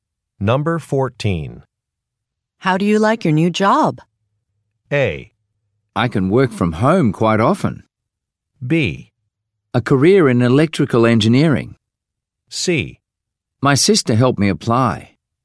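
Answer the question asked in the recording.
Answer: A: I can work from home quite often.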